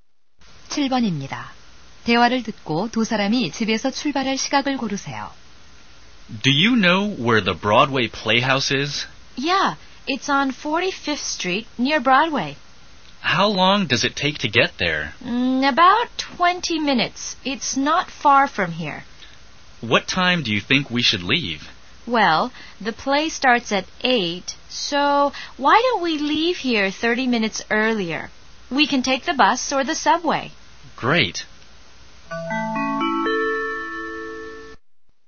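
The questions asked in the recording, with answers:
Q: 대화를 듣고 두 사람이 집에서 출발할 시각을 고르세요.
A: 7시 30분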